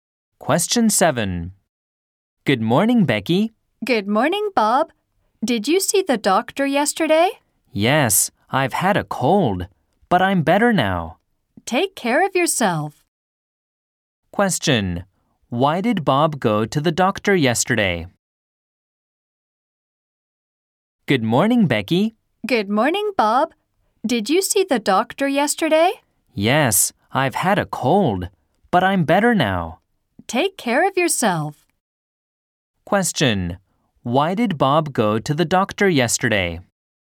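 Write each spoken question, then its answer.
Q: Why did Bob go to the doctor yesterday?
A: Because he had a cold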